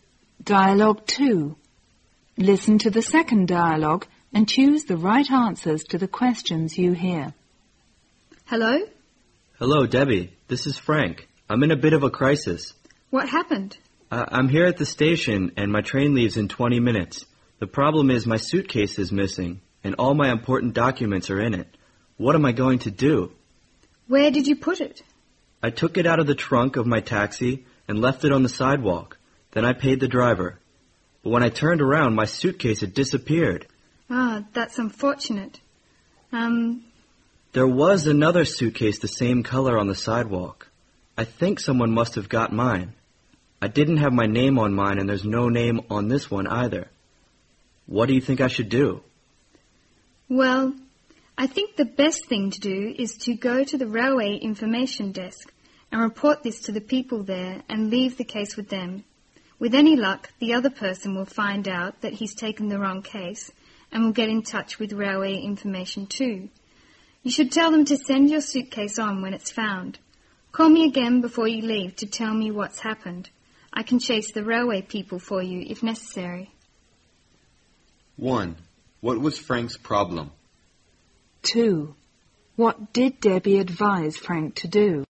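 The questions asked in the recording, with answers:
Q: What was Frank's problem?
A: His suitcase with his important documents was missing; someone probably took it by mistake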